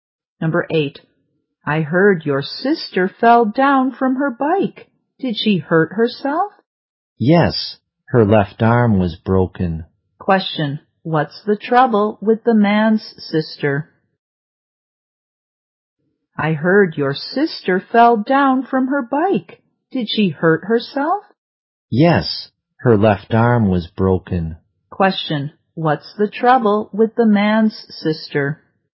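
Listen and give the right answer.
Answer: Her left arm was broken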